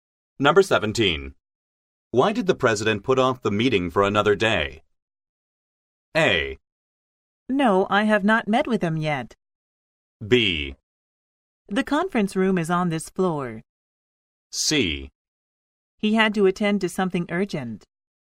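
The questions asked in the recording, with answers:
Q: Why did the president put off the meeting for another day?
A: C: He had to attend to something urgent.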